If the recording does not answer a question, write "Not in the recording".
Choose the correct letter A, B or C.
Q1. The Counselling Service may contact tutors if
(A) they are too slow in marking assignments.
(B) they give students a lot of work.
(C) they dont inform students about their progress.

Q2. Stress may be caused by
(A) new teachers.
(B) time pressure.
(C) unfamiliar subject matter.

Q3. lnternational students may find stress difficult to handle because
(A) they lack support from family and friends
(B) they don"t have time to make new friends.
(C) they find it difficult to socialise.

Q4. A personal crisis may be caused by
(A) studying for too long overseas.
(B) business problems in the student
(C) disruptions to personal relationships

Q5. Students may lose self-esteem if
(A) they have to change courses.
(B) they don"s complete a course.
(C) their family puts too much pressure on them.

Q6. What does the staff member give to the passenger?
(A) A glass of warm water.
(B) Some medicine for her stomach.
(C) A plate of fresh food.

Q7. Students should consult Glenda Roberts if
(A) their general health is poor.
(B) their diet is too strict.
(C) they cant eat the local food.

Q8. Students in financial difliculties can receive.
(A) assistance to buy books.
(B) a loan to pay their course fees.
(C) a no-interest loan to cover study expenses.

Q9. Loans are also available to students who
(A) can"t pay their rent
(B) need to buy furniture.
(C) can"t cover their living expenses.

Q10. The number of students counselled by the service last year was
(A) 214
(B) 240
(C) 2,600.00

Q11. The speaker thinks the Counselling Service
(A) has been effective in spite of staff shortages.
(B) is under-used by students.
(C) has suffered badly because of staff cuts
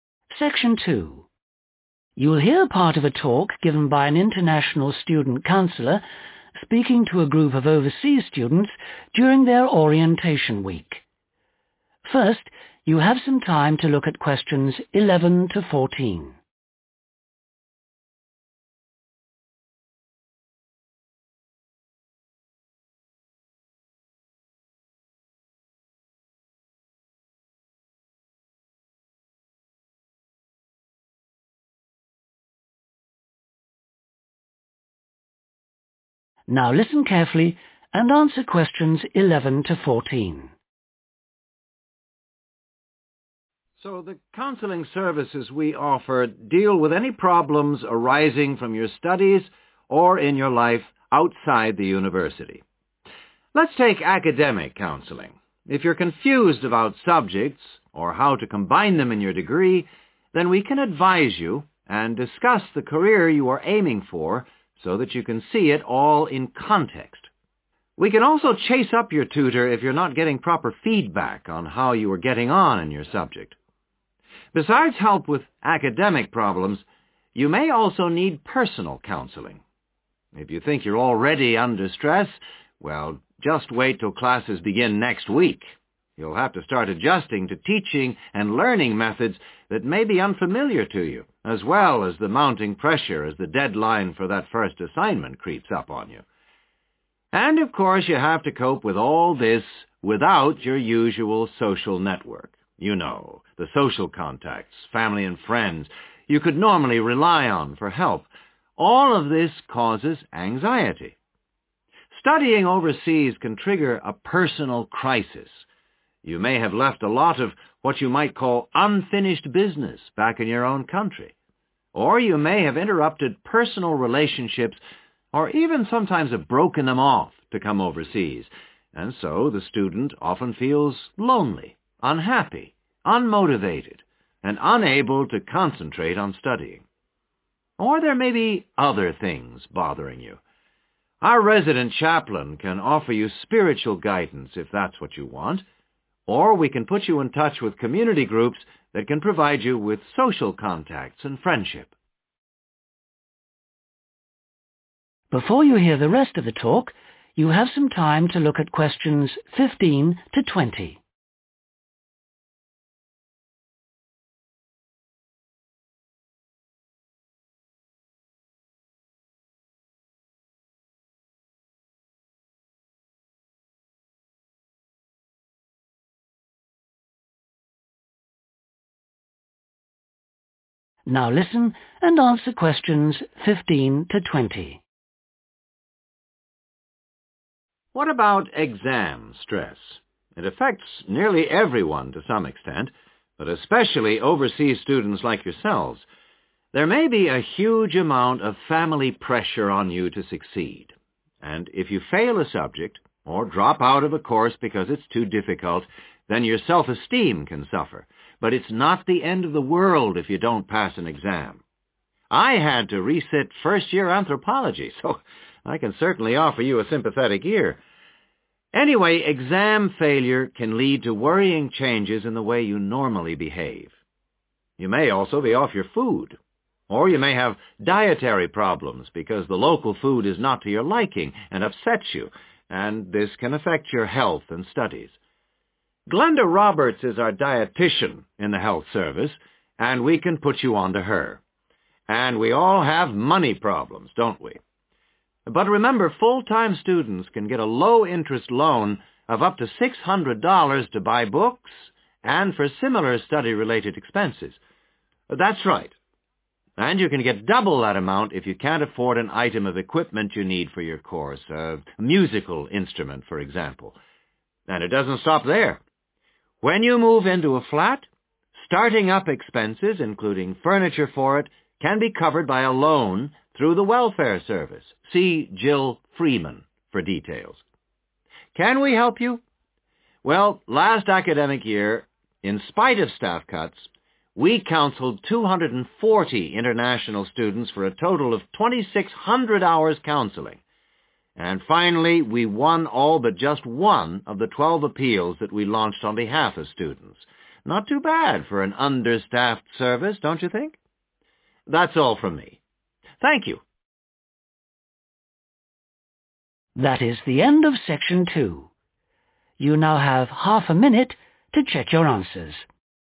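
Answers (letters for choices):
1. C
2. B
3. A
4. C
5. B
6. Not in the recording
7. C
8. A
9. B
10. B
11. A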